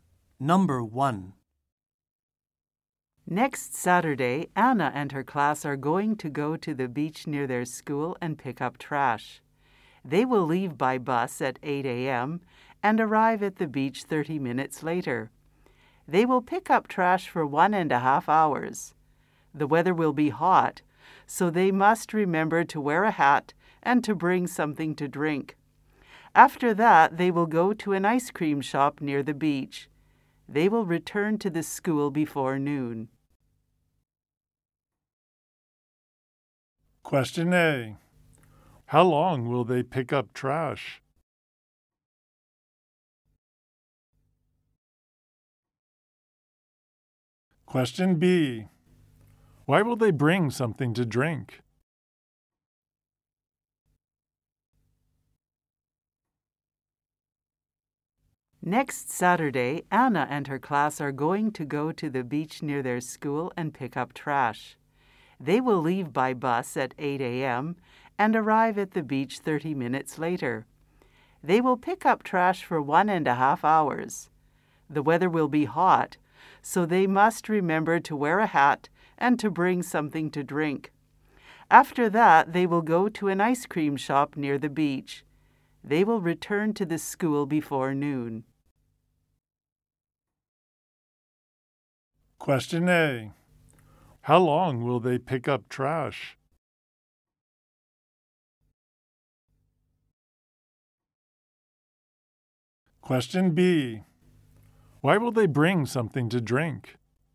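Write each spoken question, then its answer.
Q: How long will they pick up trash?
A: For 1.5 hours

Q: Why will they bring something to drink?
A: Because the weather will be hot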